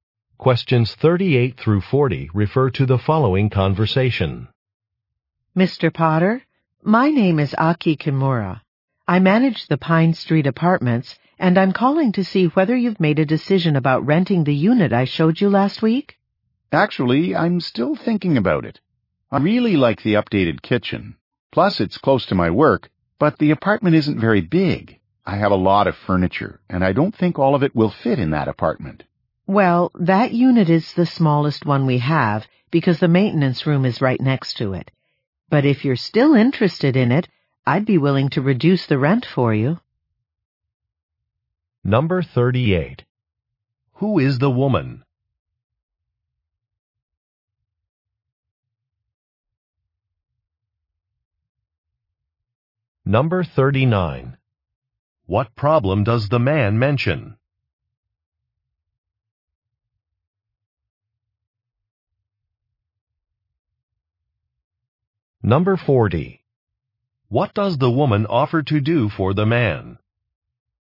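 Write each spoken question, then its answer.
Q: Who is the woman?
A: An apartment manager

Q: What problem does the man mention?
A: The apartment is too small for his furniture

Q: What does the woman offer to do for the man?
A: Reduce the rent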